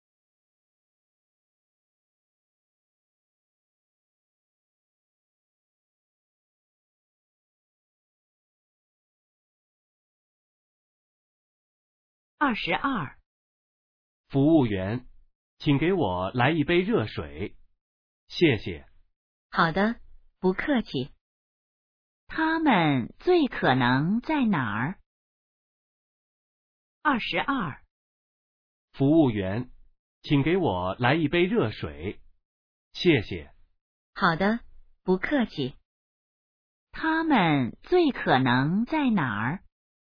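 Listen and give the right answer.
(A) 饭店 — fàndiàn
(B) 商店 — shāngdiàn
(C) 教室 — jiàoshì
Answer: (A) 饭店 — fàndiàn

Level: HSK2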